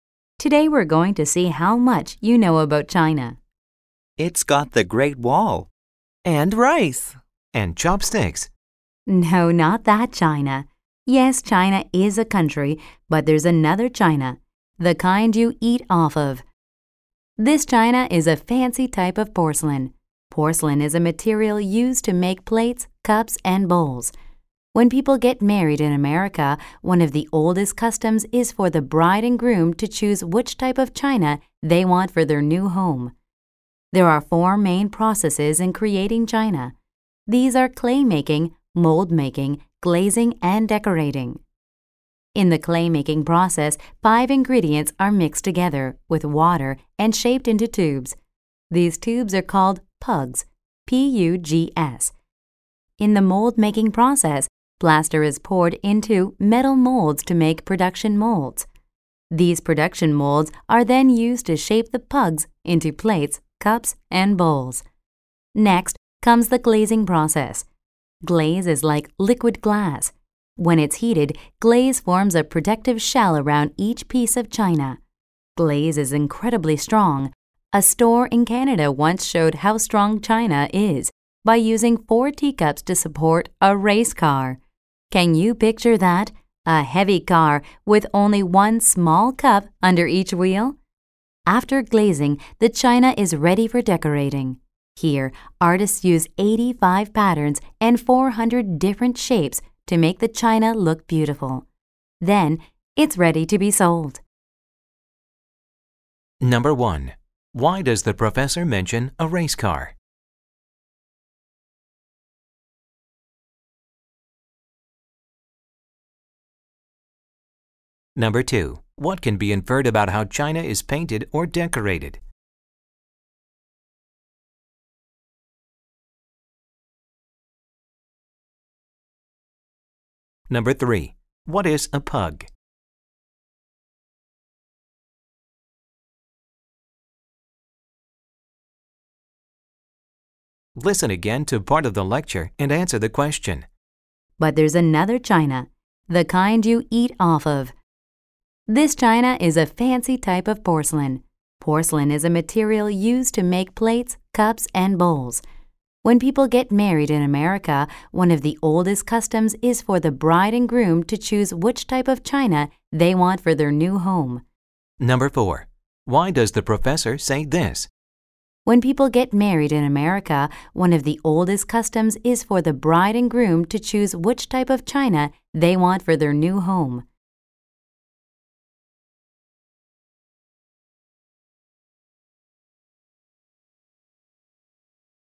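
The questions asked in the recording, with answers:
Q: Why does the professor mention a race car?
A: To show how strong glazed china is

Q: What is a pug?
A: A tube of mixed clay ingredients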